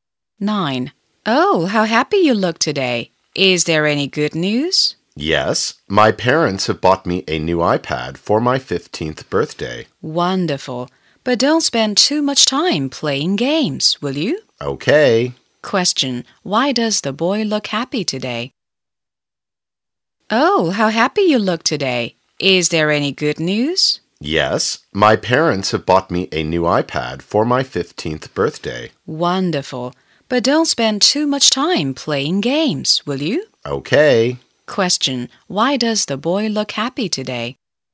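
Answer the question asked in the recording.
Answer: His parents bought him a new iPad for his 15th birthday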